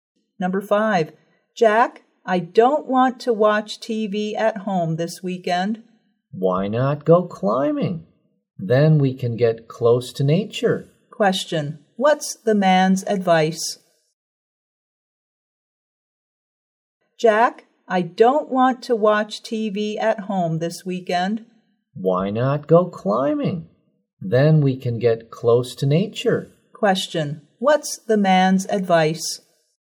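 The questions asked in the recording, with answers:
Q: Question, what's the man's advice?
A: Go climbing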